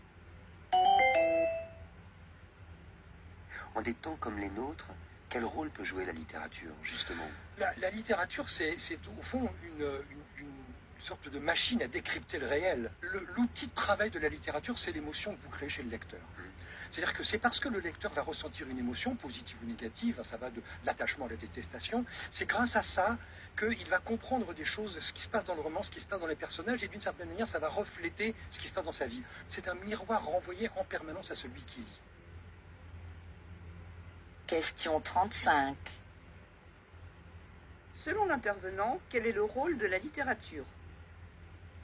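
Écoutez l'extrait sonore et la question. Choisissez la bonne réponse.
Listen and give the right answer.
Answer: Aider à décrypter le réel grâce à l'émotion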